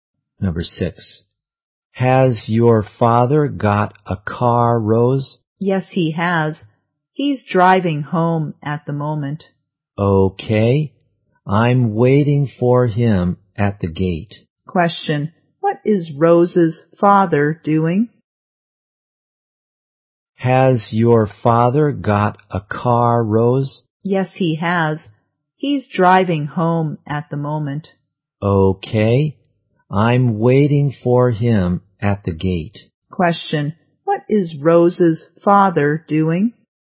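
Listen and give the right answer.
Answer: Driving home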